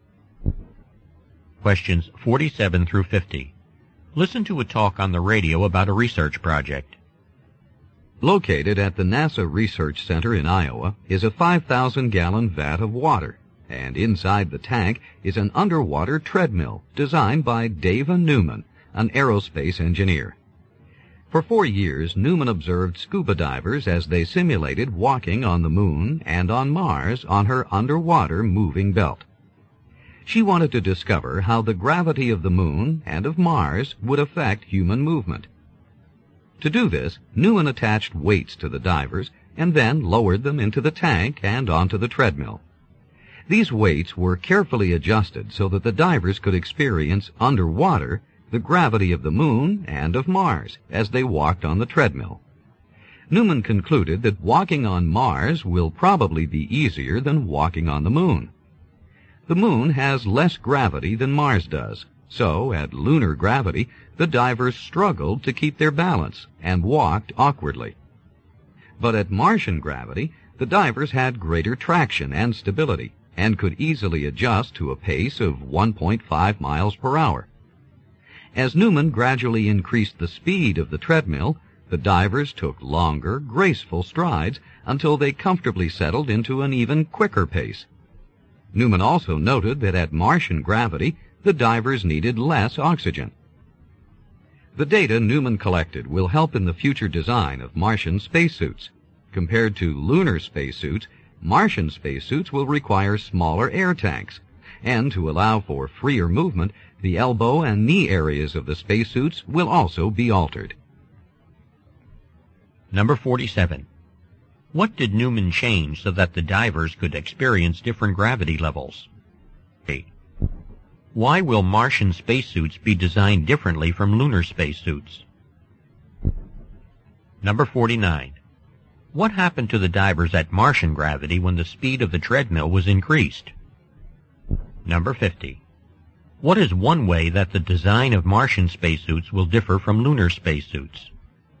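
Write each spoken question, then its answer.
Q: What did Newman change so that the divers could experience different gravity levels?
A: The weights attached to the divers

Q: What happened to the divers at Martian gravity when the speed of the treadmill was increased?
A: They took longer strides and settled into a quicker pace

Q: What is one way that the design of Martian spacesuits will differ from lunar spacesuits?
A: Smaller air tanks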